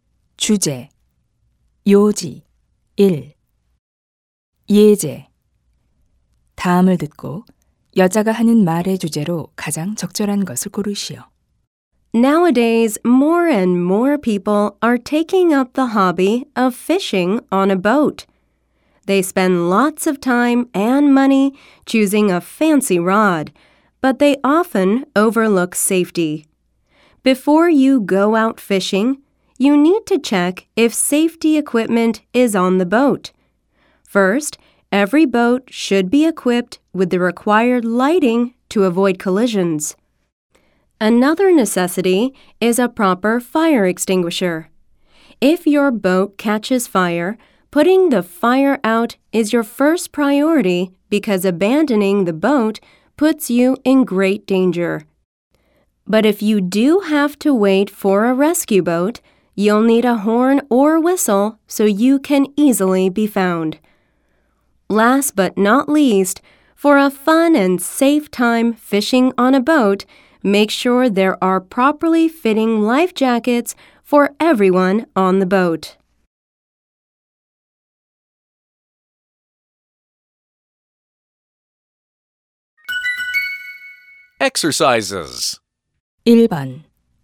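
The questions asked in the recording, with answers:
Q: 다음을 듣고 여자가 하는 말의 주제로 가장 적절한 것을 고르시오.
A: 배 낚시를 할 때 갖춰야 할 안전 장비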